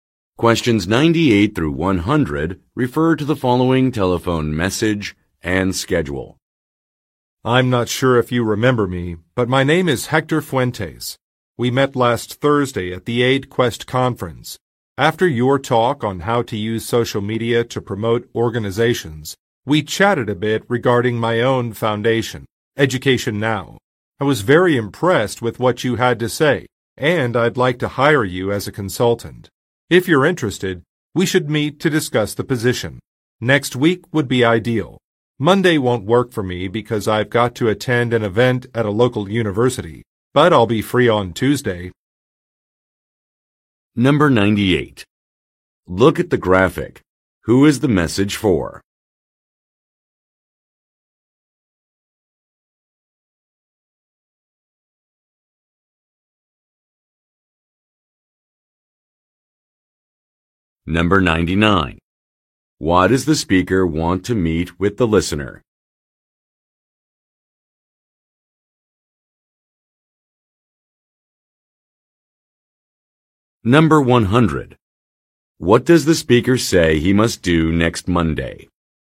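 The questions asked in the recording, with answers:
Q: Why does the speaker want to meet with the listener?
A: To discuss hiring the listener as a consultant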